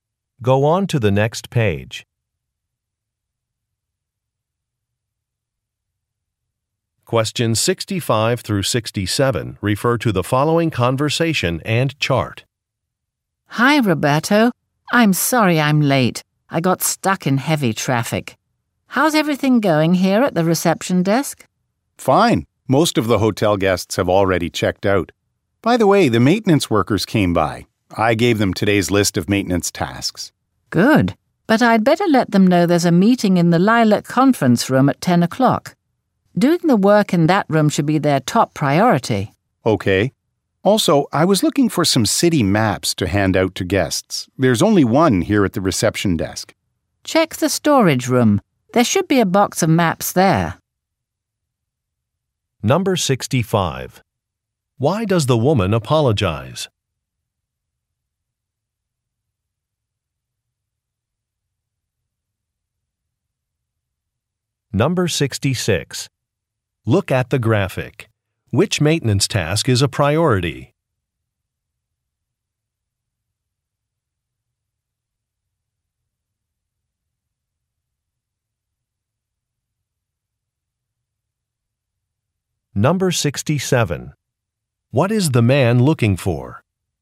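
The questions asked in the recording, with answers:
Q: Why does the woman apologize?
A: She is late due to heavy traffic

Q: What is the man looking for?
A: City maps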